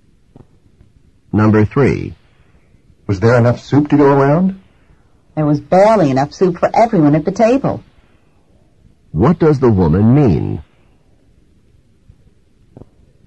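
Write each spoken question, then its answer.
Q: What does the woman mean?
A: There was just enough soup for everyone.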